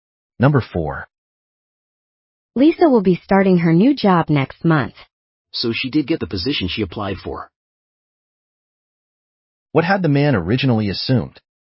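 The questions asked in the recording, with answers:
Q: What had the man originally assumed?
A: That Lisa had not gotten the position.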